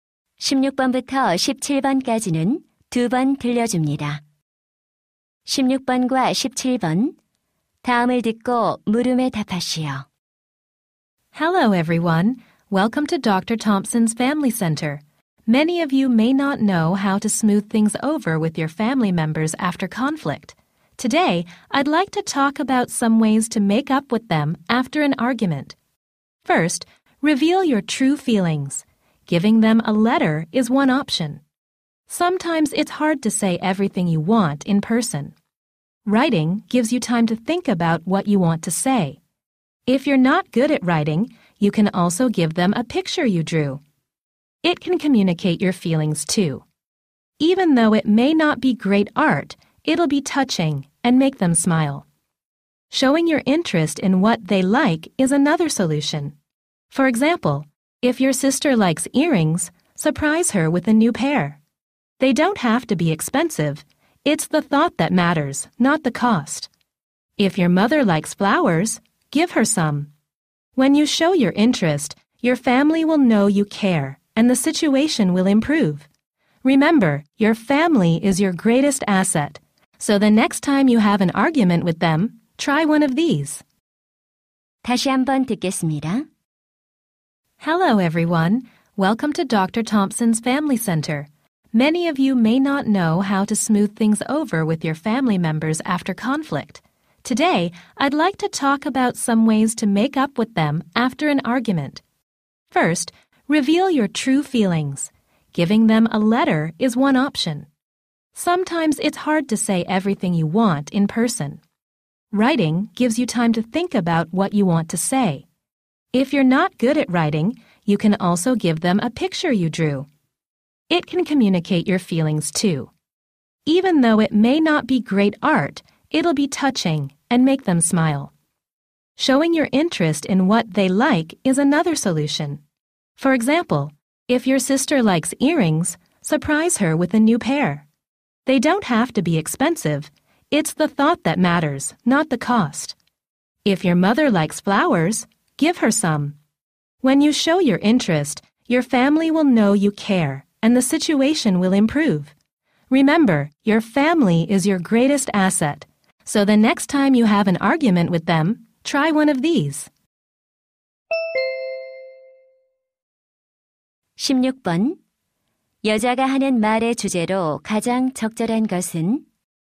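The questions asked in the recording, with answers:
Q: 여자가 하는 말의 주제로 가장 적절한 것은?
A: 말다툼 후 가족과 화해하는 방법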